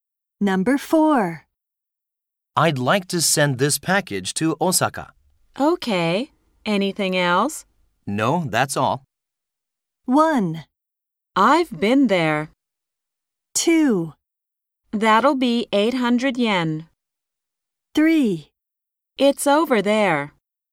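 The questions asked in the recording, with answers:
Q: No, that's all.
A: 2: That'll be 800 yen.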